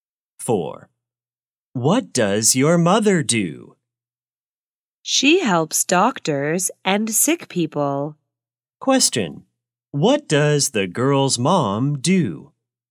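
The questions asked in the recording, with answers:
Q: What does the girl's mom do?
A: She is a nurse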